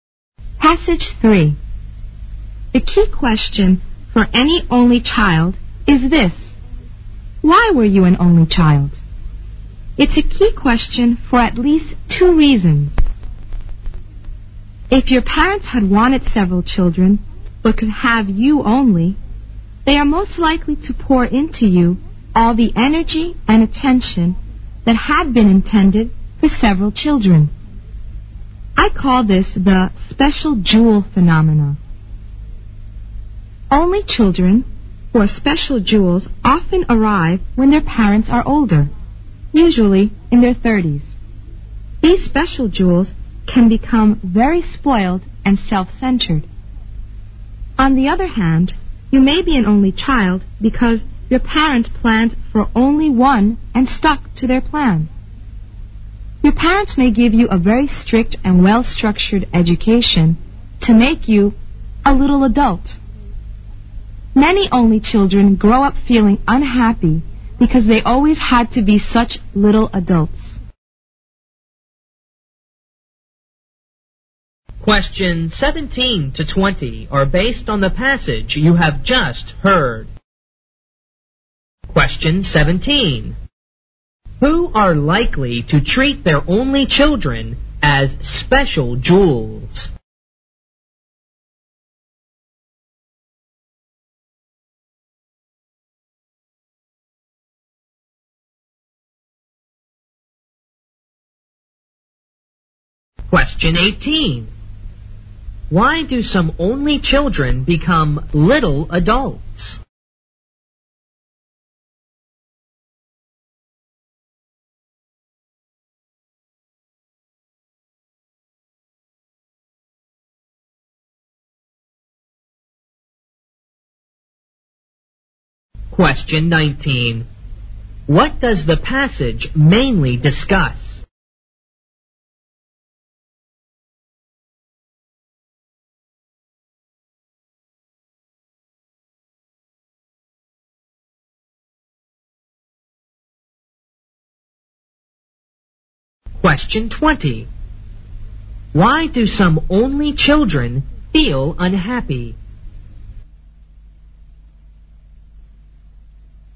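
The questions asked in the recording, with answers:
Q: Who are likely to treat their only children as special jewels?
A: Parents who wanted several children but could have only one

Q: Why do some only children become little adults?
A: Their parents give them a strict, well-structured education

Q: What does the passage mainly discuss?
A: Why people are only children and how it affects them

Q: Why do some only children feel unhappy?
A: They always had to behave like little adults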